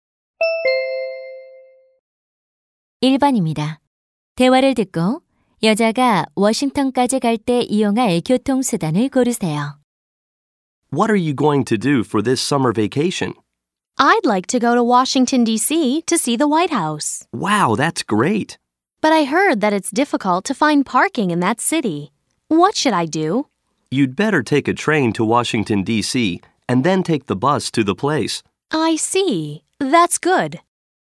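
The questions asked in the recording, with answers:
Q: 대화를 듣고 여자가 워싱턴까지 갈 때 이용할 교통수단을 고르세요.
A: 기차 (train)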